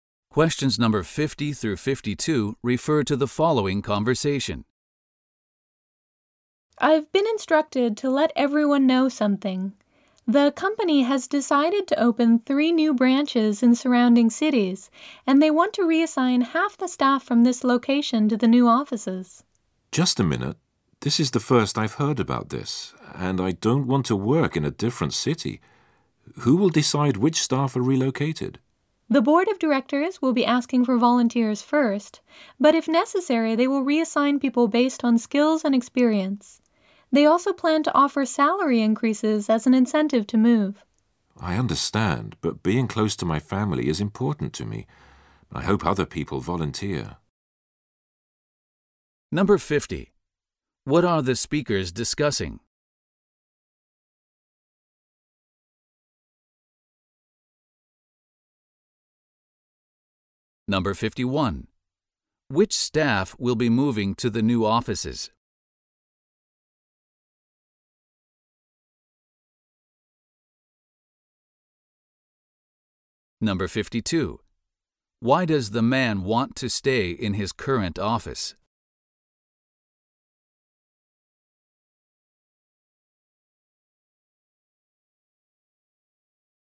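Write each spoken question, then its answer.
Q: What are the speakers discussing?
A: The company is opening three new branches and moving half the staff to them

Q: Which staff will be moving to the new offices?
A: Volunteers first, then people chosen for their skills and experience if needed

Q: Why does the man want to stay in his current office?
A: Being close to his family is important to him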